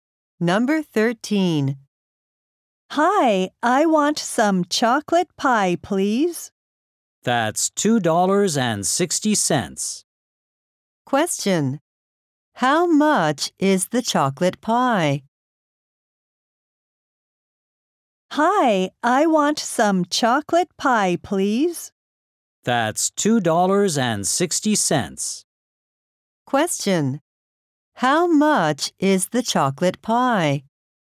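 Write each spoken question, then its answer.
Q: How much is the chocolate pie?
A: $2.60.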